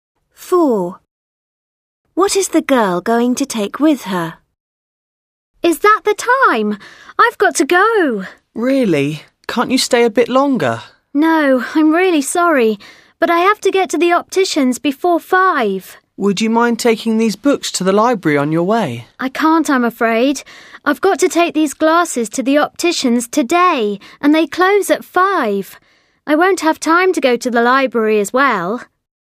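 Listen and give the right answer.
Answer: Glasses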